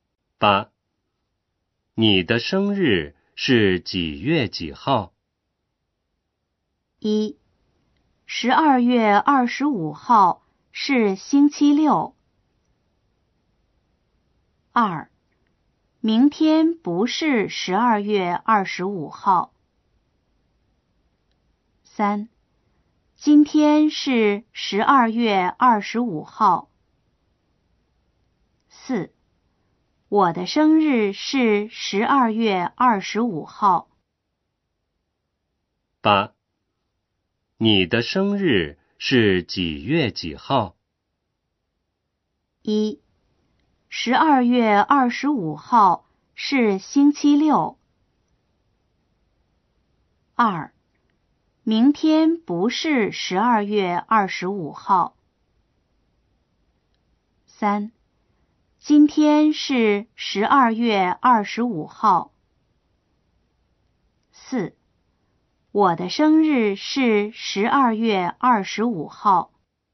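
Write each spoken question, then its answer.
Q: 你的生日是几月几号?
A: 4: 我的生日是12月25号。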